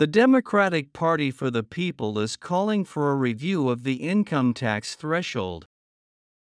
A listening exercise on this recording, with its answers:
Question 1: The Democratic Party for the People is calling for ( ).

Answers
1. a review of the income tax threshold

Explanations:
この単語を書けない人が多数いるのが事前に予想できたため、メルマガに以下のヒントを添えておきました。 設問に難易度高めの単語が1つ含まれているため、英文記事の該当箇所を事前によく読んでおいてください。 メルマガからリンクを張った英文の参考記事を読めば「threshold」が出てきますので、これに気づいた人は正解できたかと思います。